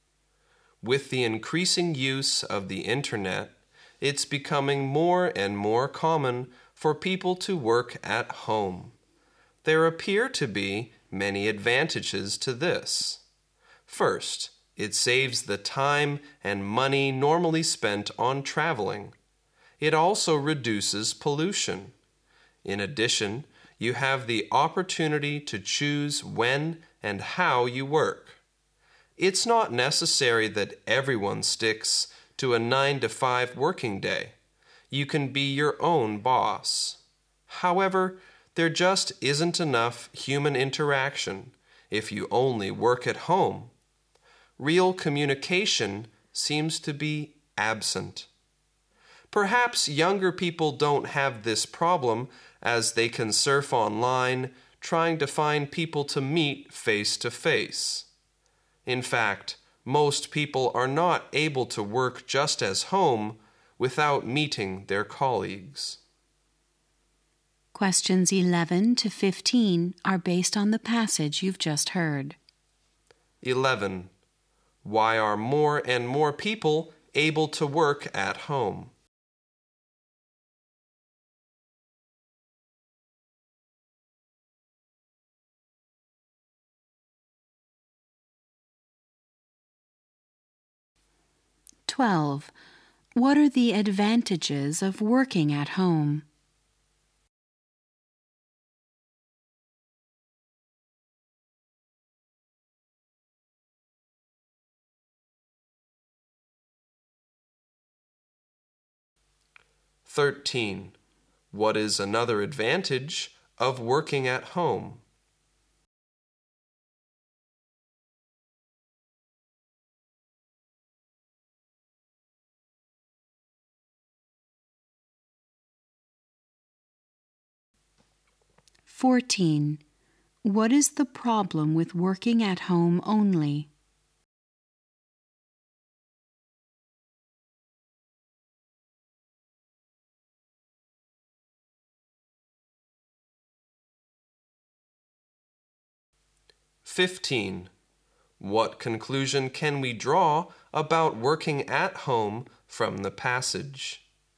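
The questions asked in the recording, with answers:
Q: Why are more and more people able to work at home?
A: The increasing use of the internet

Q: What are the advantages of working at home?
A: It saves time and money spent on traveling

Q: What is the problem with working at home only?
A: Not enough human interaction

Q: What conclusion can we draw about working at home from the passage?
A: Most people can't work only at home without meeting colleagues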